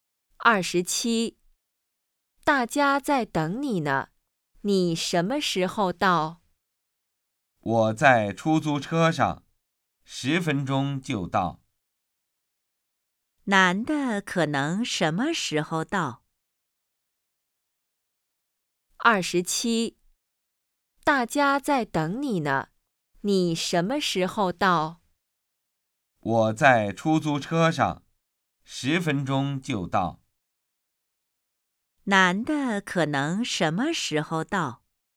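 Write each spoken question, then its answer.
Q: 男的可能什么时候到?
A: 10分钟后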